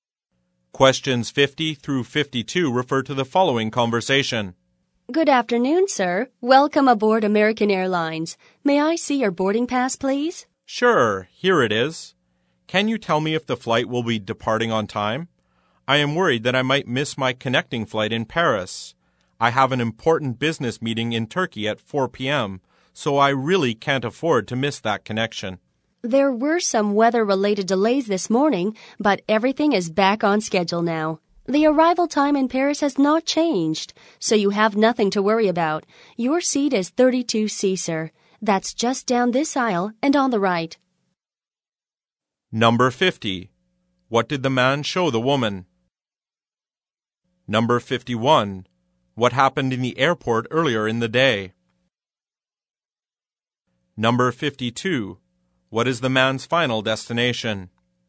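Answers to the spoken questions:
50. His boarding pass
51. There were weather-related delays
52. Turkey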